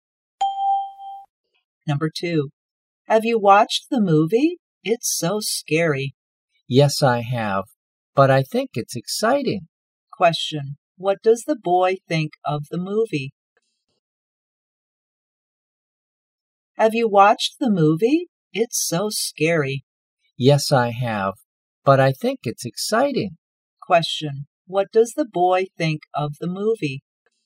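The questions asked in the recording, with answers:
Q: what does the boy think of the movie?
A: It's exciting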